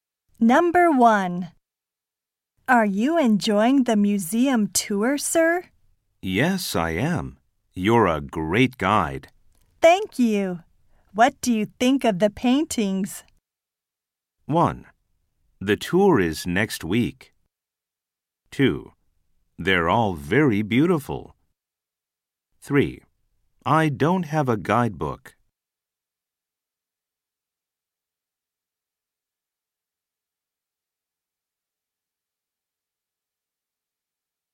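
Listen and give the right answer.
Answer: 2: They're all very beautiful.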